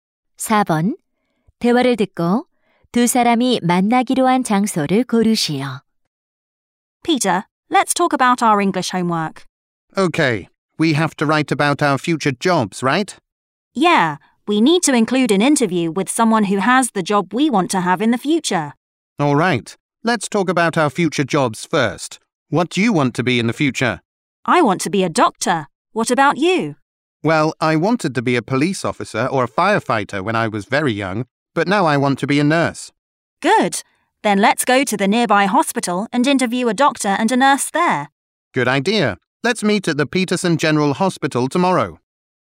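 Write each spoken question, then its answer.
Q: 대화를 듣고 두 사람이 만나기로 한 장소를 고르시오.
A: Peterson 종합병원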